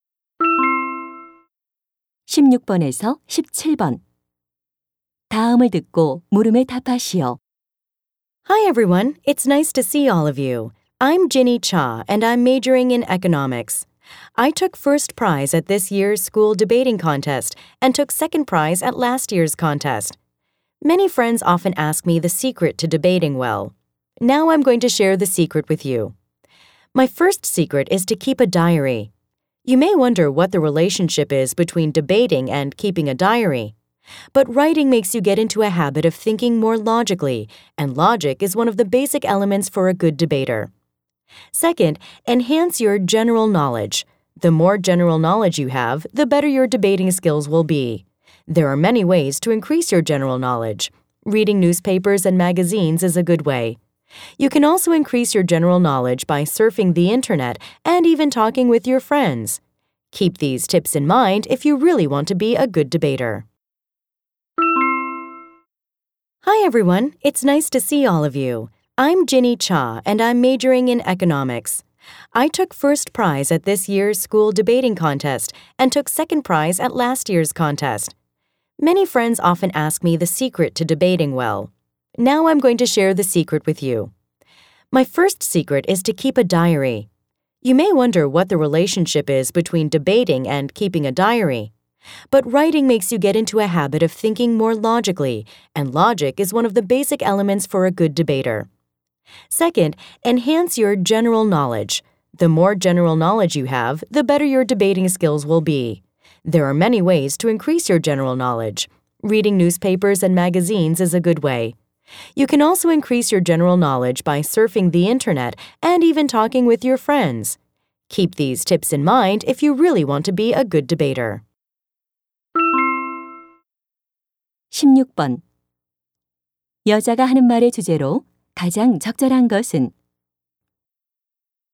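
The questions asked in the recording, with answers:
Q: 여자가 하는 말의 주제로 가장 적절한 것은?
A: 토론을 잘하는 비결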